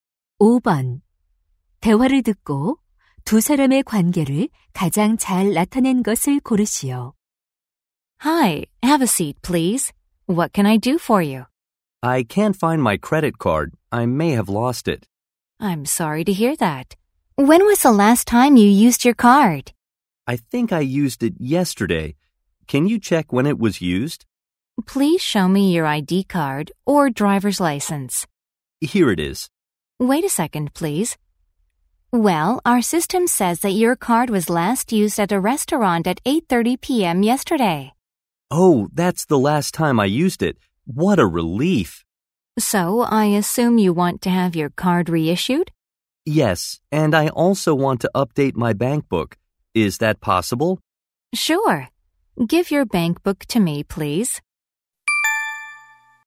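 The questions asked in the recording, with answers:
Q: 대화를 듣고 두 사람의 관계를 가장 잘 나타낸 것을 고르시오.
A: 은행 직원 - 고객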